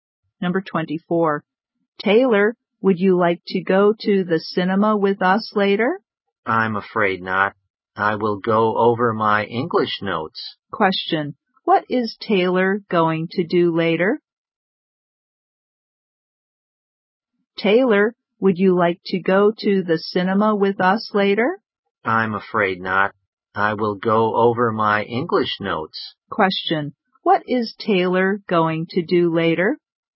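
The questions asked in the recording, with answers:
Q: What is Taylor going to do later?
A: Go over his English notes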